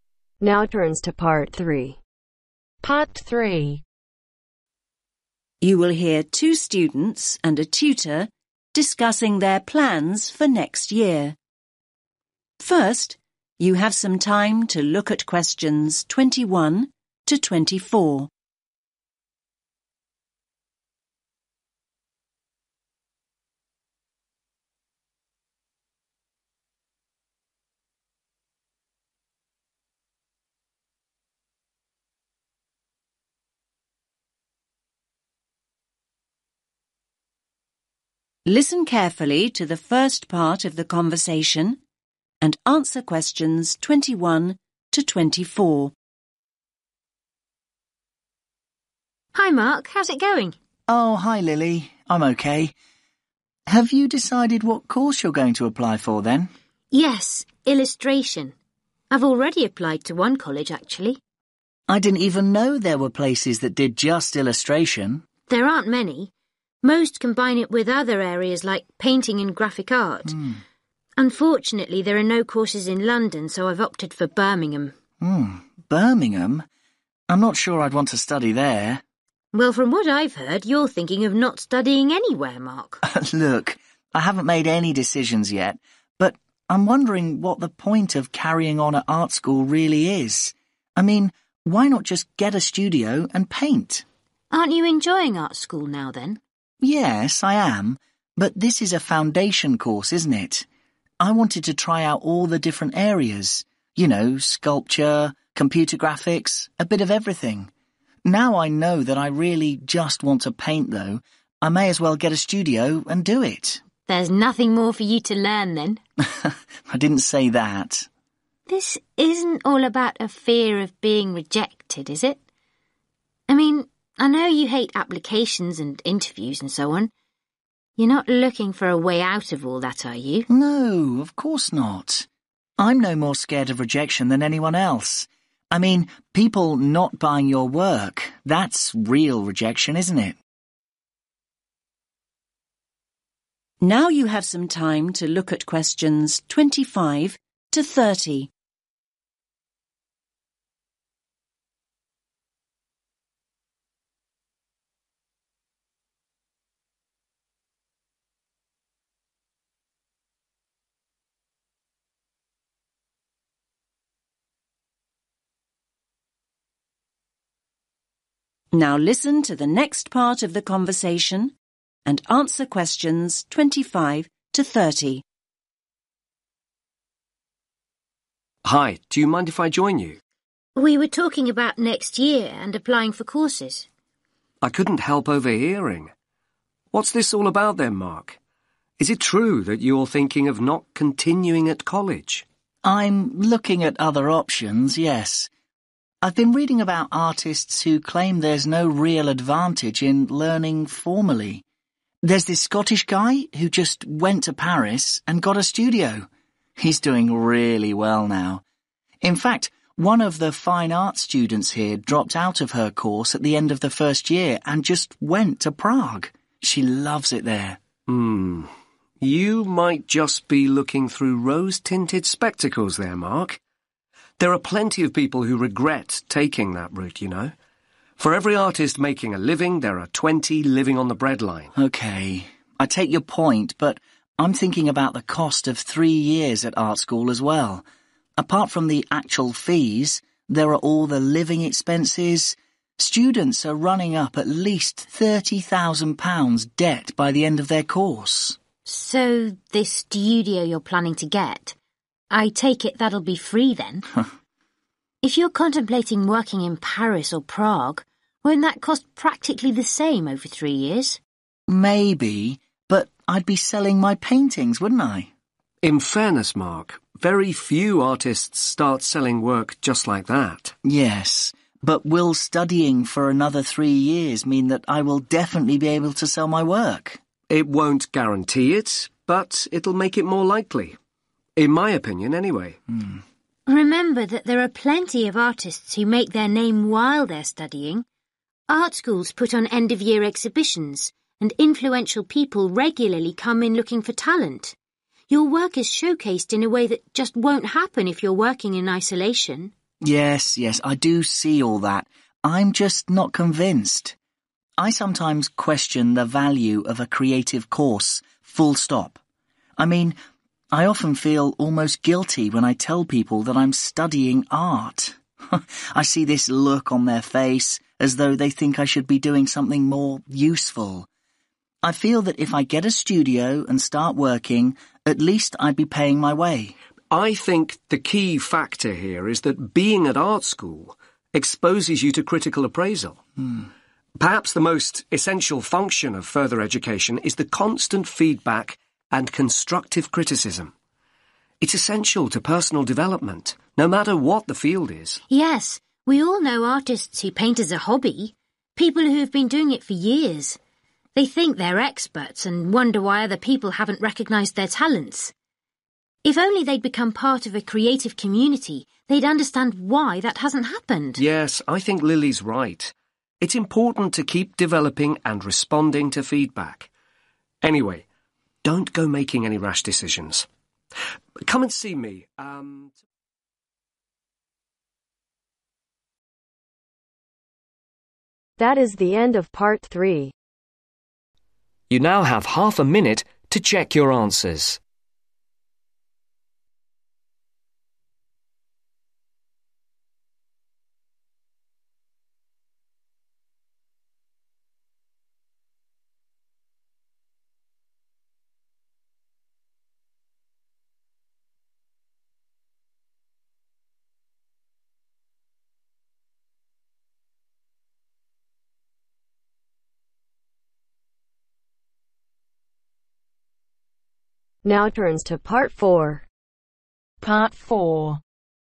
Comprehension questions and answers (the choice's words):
Answer the questions below. Write ONE WORD ONLY for each answer.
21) What course does Lily want to study next year ?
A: Illustration

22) Where is Lily probably going to study ?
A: Birmingham

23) What course are Mark and Lily studying on now ?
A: Foundation

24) What does Lily think Mark might be afraid of ?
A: Rejection

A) Mark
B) Lily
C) Tutor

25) most artists do not earn much money ..........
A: Tutor

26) renting studio space can be very expensive ..........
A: Lily

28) some people disapprove of artistic courses ..........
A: Mark

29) young artists need regular evaluation of their work ..........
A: Tutor

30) amateur artists have an unrealistic view of their work ..........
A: Lily